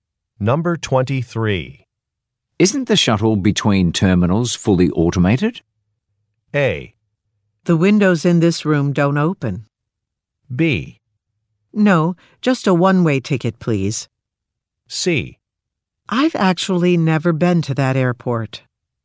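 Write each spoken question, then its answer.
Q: Isn't the shuttle between terminals fully automated?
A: C: I've actually never been to that airport.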